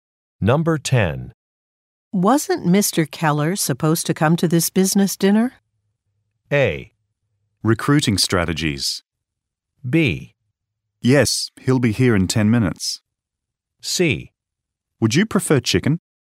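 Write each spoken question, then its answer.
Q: Wasn't Mr. Keller supposed to come to this business dinner?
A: B: Yes, he'll be here in 10 minutes.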